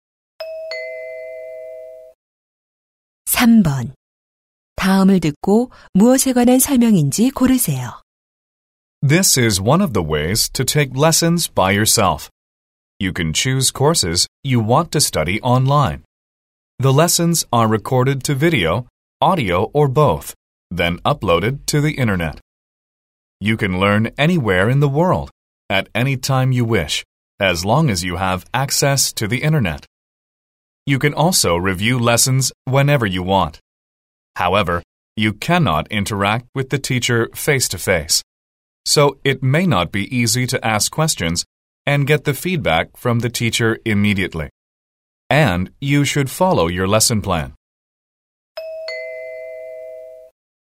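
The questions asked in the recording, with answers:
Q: 다음을 듣고 무엇에 관한 설명인지 고르세요.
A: 온라인 강의 (인터넷 강의)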